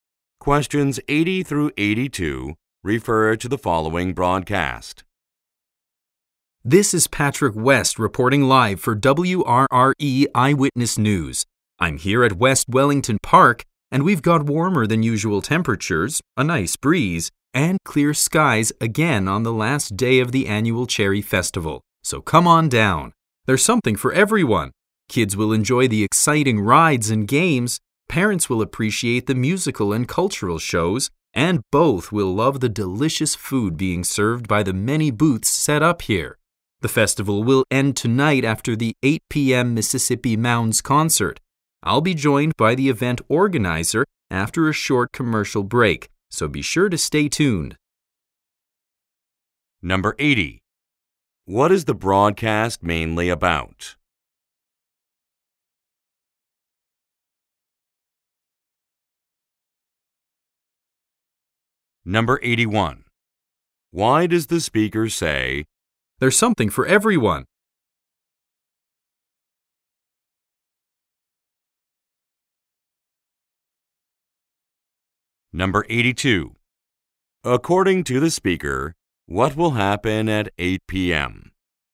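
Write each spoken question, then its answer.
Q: What is the broadcast mainly about?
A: The annual Cherry Festival

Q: Why does the speaker say,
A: The festival offers activities for all ages

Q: According to the speaker, what will happen at 8 p.m.?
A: A concert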